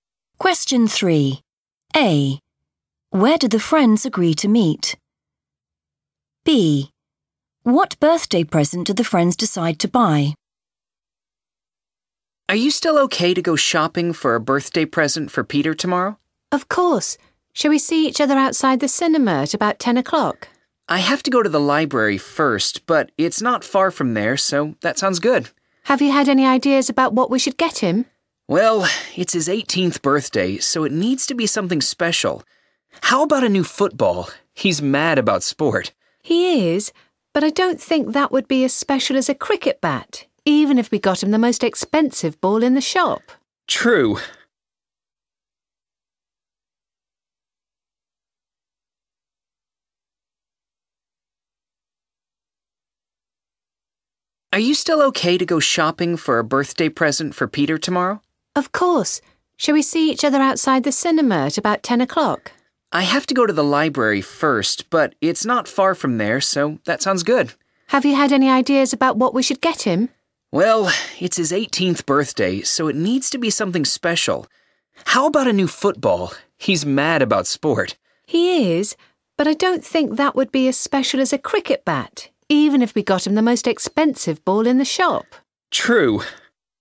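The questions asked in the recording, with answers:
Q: Where do the friends agree to meet?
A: outside the cinema

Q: What birthday present do the friends decide to buy?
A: a cricket bat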